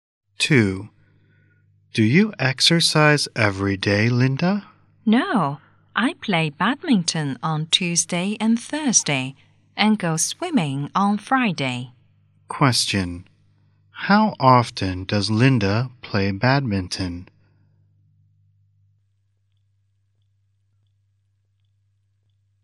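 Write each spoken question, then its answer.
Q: How often does Linda play badminton?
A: Twice a week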